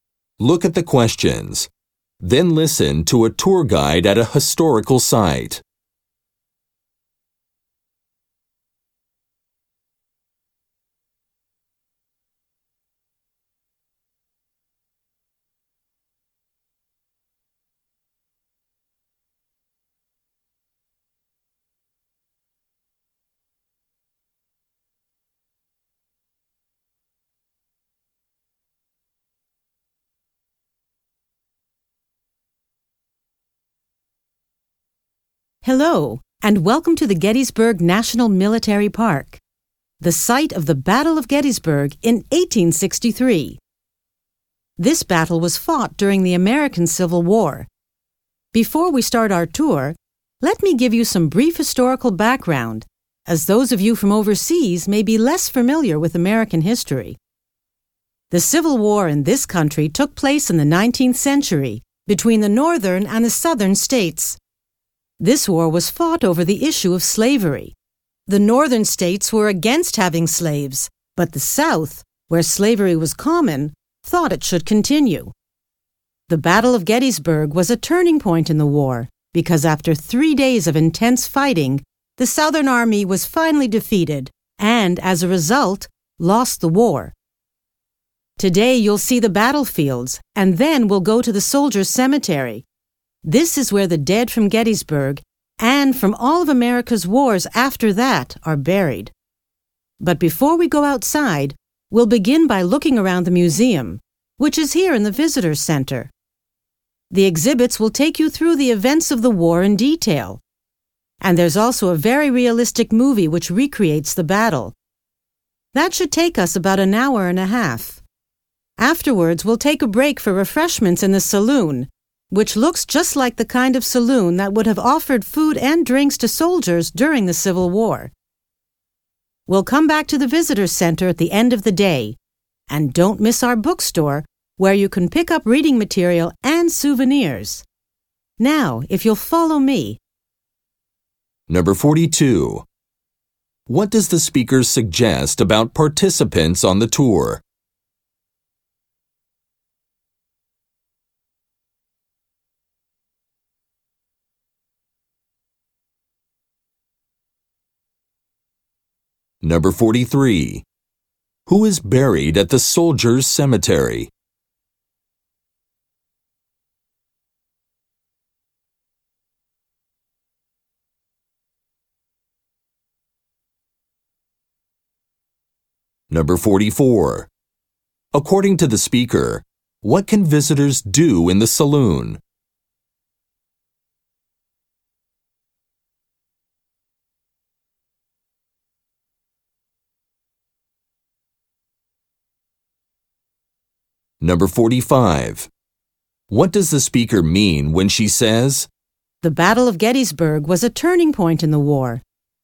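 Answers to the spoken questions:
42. Some are from overseas
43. The dead from Gettysburg and later American wars
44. Have refreshments
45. The battle decided the outcome of the war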